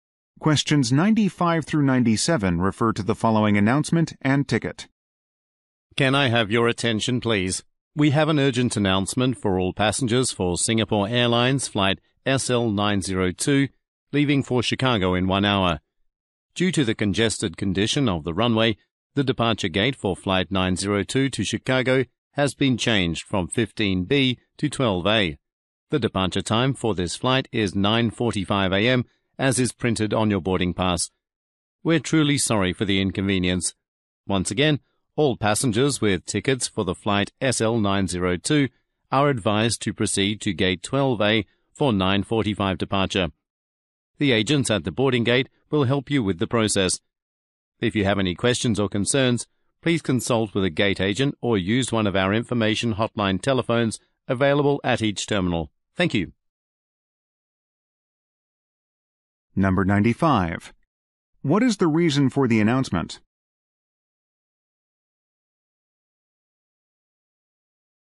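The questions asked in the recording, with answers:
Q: What is the reason for the announcement?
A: To announce a change of departure gate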